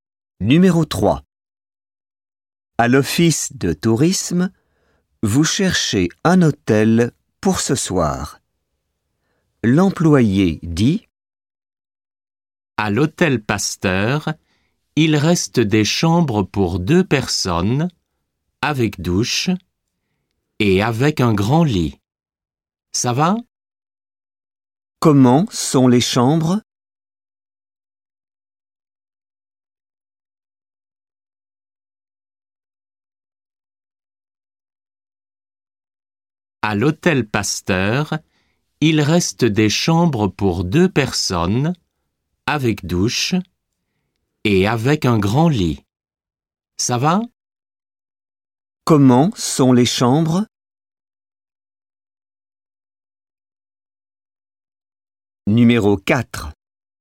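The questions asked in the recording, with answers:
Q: Comment sont les chambres?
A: Pour deux personnes, avec douche et un grand lit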